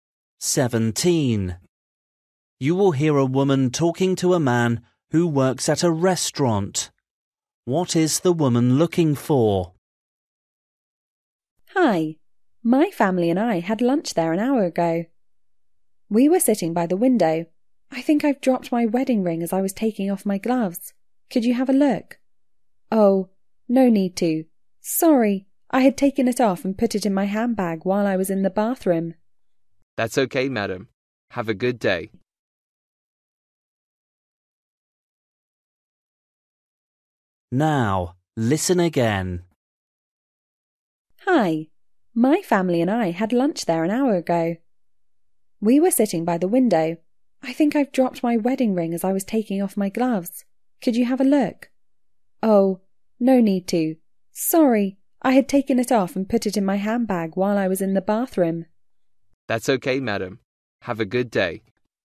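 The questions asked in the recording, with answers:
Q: What is the woman looking for?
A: Her wedding ring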